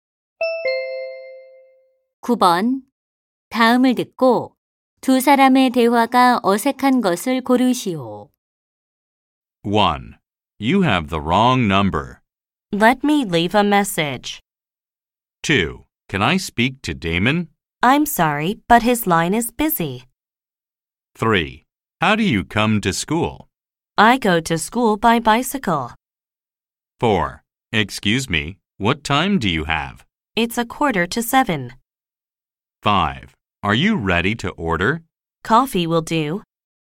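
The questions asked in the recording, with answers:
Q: 다음을 듣고 두 사람의 대화가 어색한 것을 고르시오.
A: 1: You have the wrong number. / Let me leave a message.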